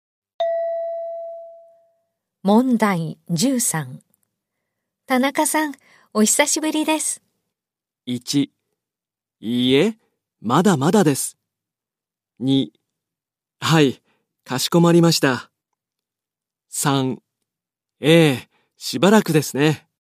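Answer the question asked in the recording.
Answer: 3: ええ、しばらくですね。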